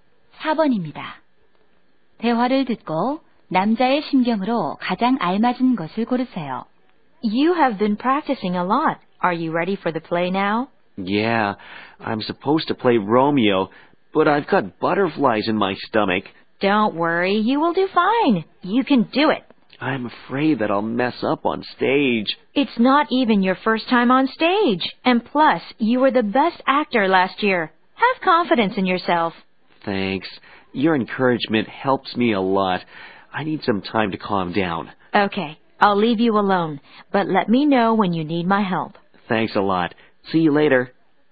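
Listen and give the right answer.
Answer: 긴장되고 불안함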